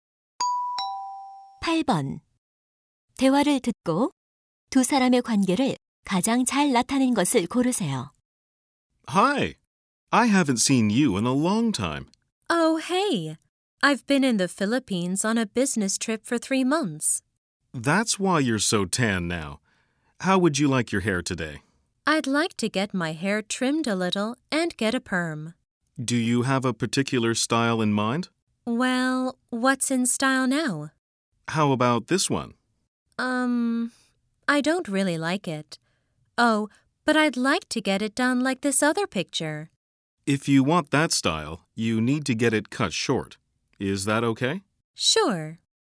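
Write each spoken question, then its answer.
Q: 대화를 듣고 두 사람의 관계를 가장 잘 나타낸 것을 고르세요.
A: 미용사와 손님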